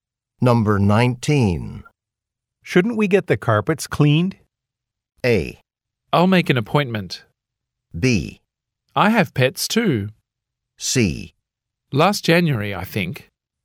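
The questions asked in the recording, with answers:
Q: Shouldn't we get the carpets cleaned?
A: A: I'll make an appointment.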